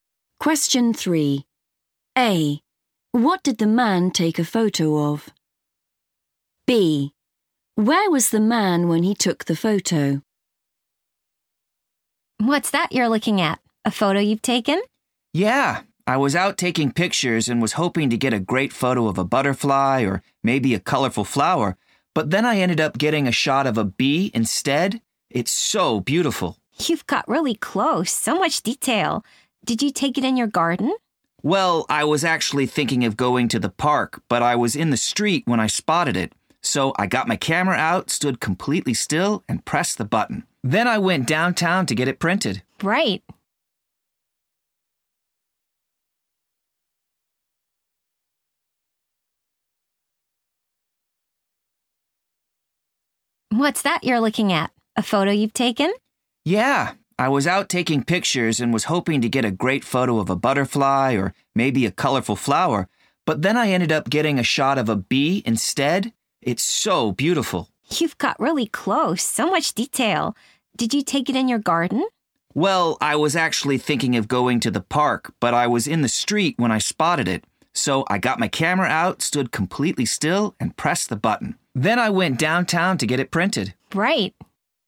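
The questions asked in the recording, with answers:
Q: What did the man take a photo of?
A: a bee

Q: Where was the man when he took the photo?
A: in the street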